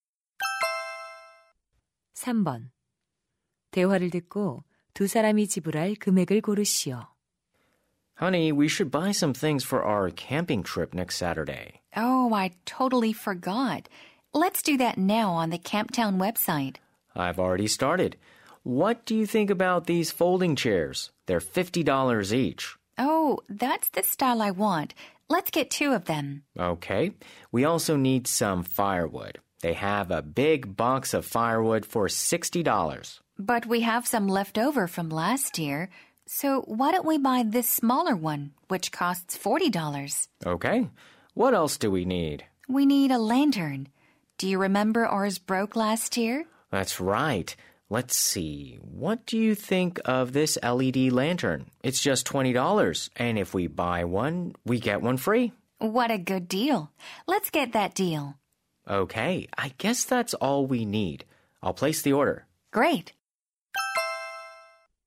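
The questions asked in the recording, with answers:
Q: 대화를 듣고 두 사람이 지불할 금액을 고르시오.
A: 160달러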